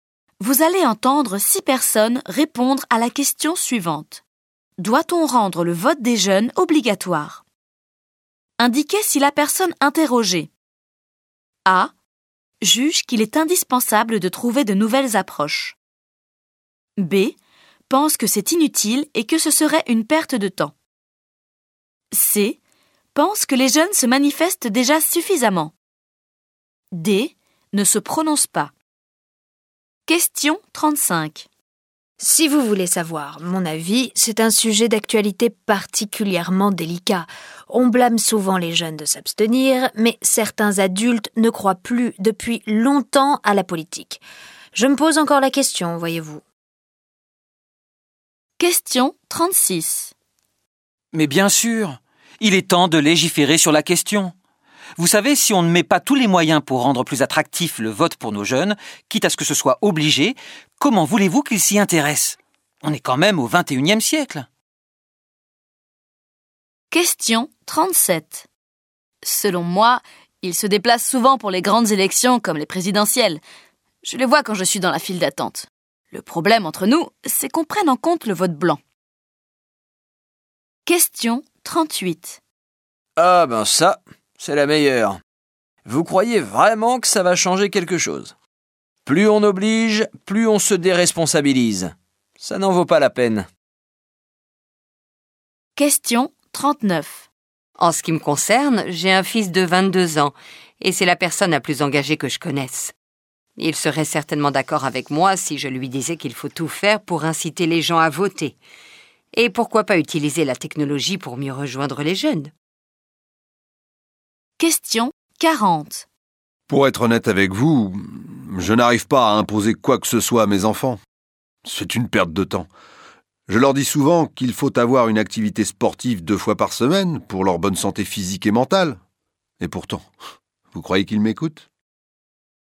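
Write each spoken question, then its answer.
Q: Doit-on rendre le vote des jeunes obligatoire?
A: D: ne se prononce pas

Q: Doit-on rendre le vote des jeunes obligatoire?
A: A: juge qu'il est indispensable de trouver de nouvelles approches

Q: Doit-on rendre le vote des jeunes obligatoire?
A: C: pense que les jeunes se manifestent déjà suffisamment

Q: Doit-on rendre le vote des jeunes obligatoire?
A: B: pense que c'est inutile et que ce serait une perte de temps

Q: Doit-on rendre le vote des jeunes obligatoire?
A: A: juge qu'il est indispensable de trouver de nouvelles approches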